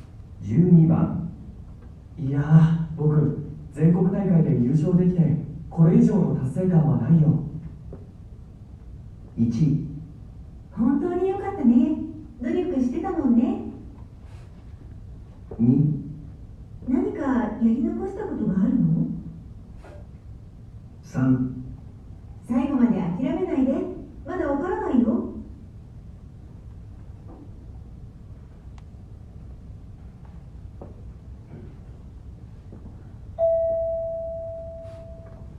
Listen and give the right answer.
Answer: 1

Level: N1 Listening · Test 2